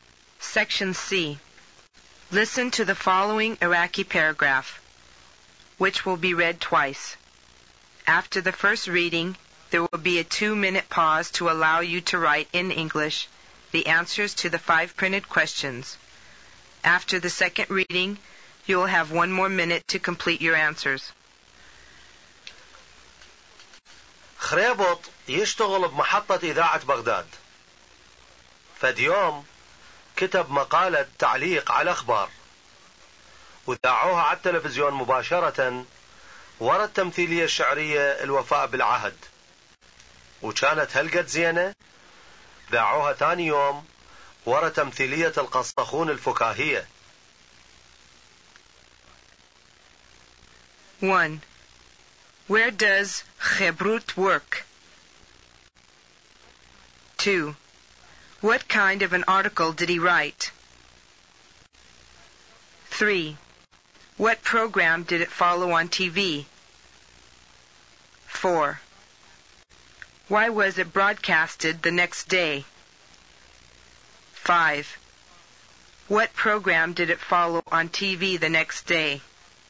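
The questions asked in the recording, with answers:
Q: Where does Khebrut work?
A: At the Baghdad broadcasting station

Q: What kind of an article did he write?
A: A news commentary

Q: What program did it follow on TV?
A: The poetic play "Keeping the Promise" (al-Wafa bil-Ahd)

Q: Why was it broadcasted the next day?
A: Because it was so good

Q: What program did it follow on TV the next day?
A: The comic play "The Storyteller" (al-Qasakhun)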